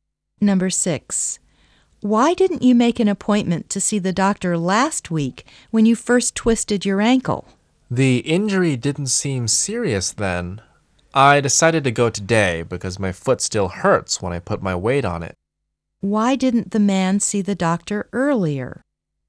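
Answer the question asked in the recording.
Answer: The injury didn't seem serious then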